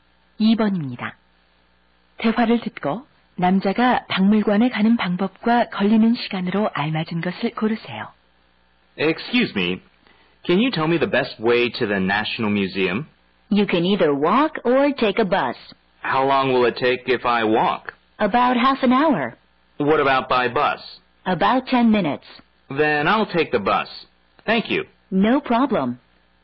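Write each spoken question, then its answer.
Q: 대화를 듣고 남자가 박물관에 가는 방법과 걸리는 시간으로 알맞은 것을 고르세요.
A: 버스, 약 10분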